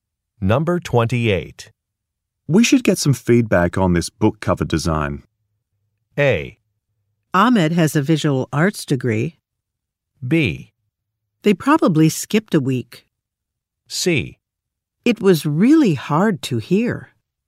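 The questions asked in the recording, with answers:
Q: We should get some feedback on this book cover design.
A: A: Ahmed has a visual arts degree.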